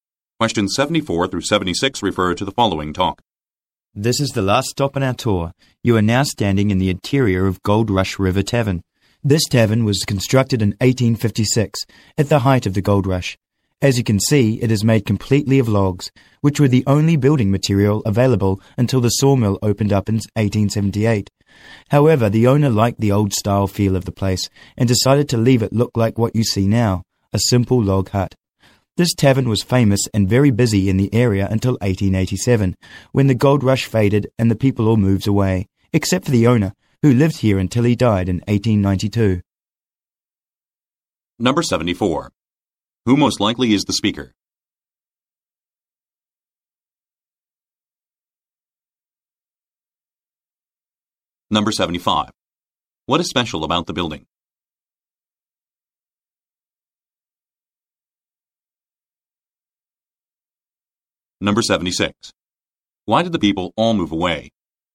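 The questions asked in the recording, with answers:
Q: Who most likely is the speaker?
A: A tour guide

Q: What is special about the building?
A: It is made completely of logs

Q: Why did the people all move away?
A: The gold rush faded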